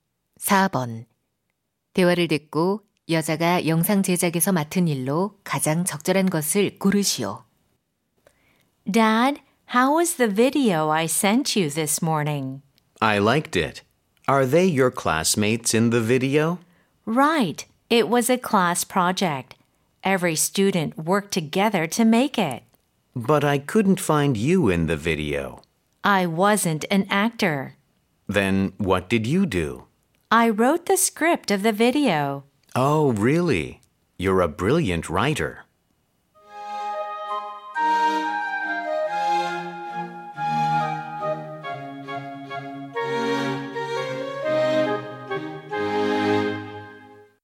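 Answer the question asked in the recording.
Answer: 대본 쓰기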